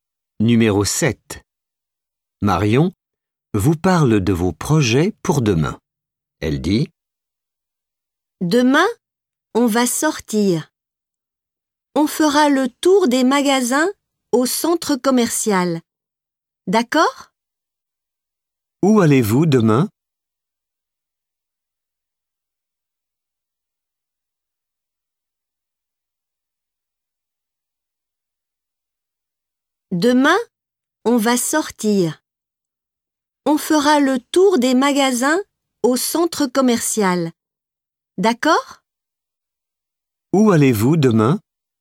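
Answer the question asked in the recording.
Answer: Au centre commercial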